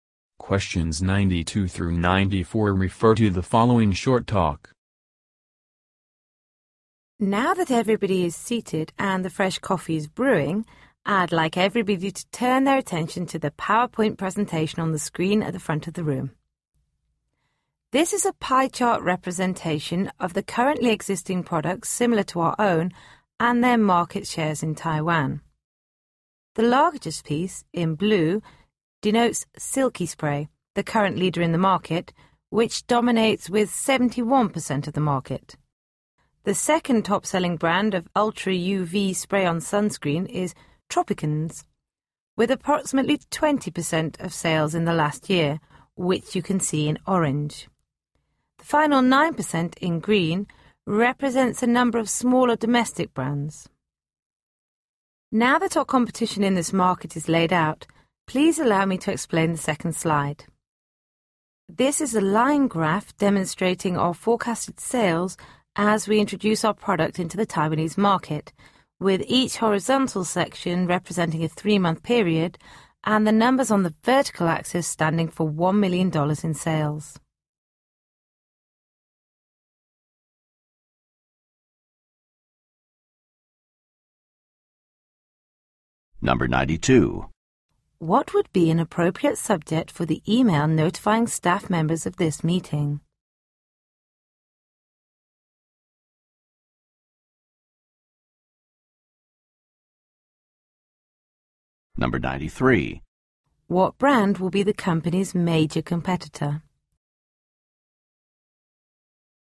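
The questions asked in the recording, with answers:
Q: What brand will be the company's major competitor?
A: Silky Spray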